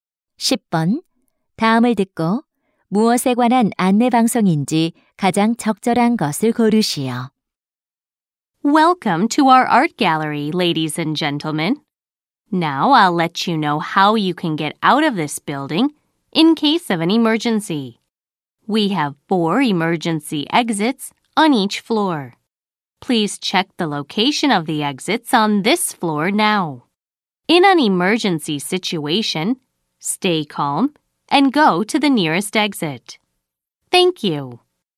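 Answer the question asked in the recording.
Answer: 비상 시 대피 요령(비상구 안내)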